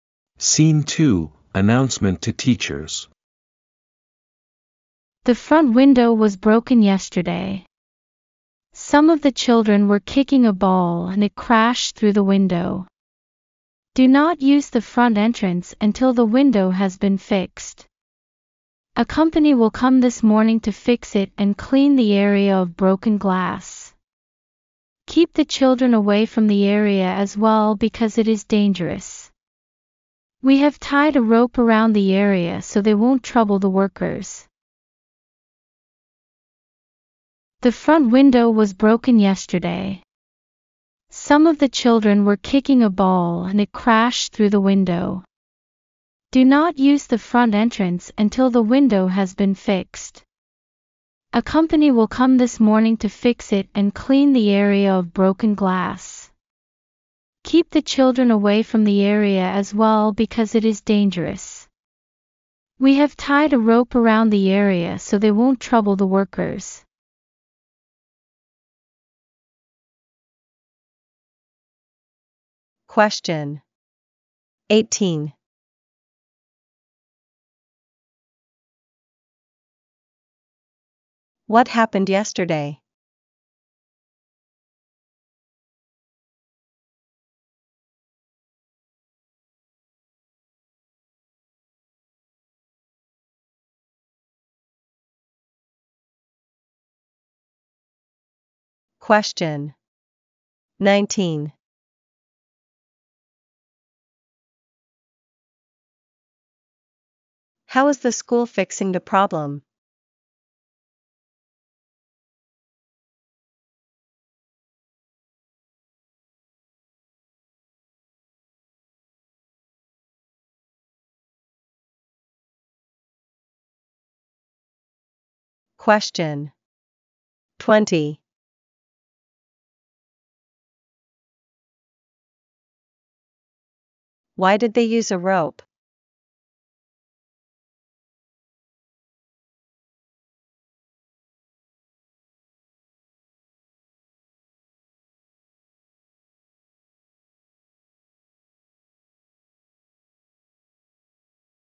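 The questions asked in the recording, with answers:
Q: What happened yesterday?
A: Children kicking a ball broke the front window

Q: How is the school fixing the problem?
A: A company will come to fix the window and clean up the glass

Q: Why did they use a rope?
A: So the children won't trouble the workers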